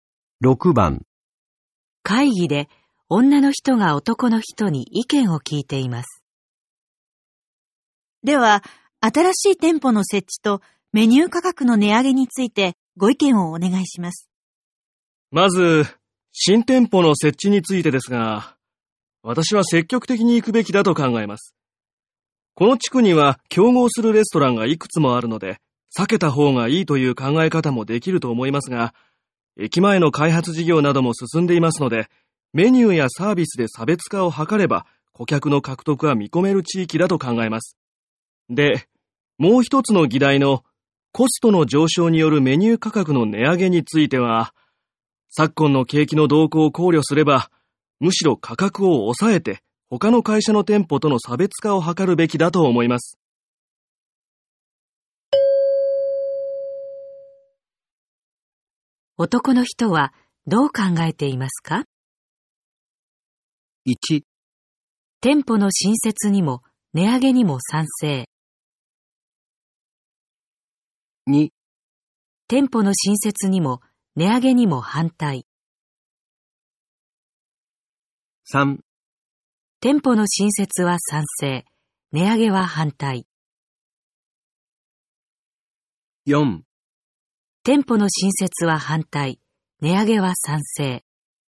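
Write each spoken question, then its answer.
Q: 男の人はどう考えていますか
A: 3: 店舗の新設は賛成、値上げは反対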